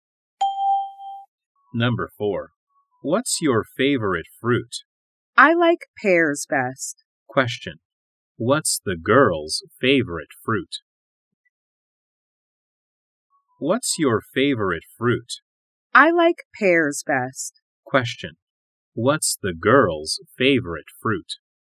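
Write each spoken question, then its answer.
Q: What's the girl's favorite fruit?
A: Pears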